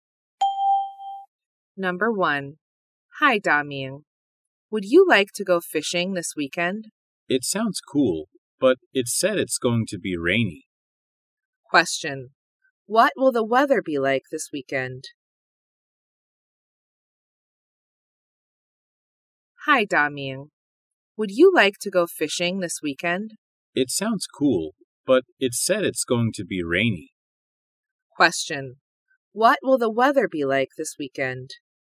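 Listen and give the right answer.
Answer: Rainy.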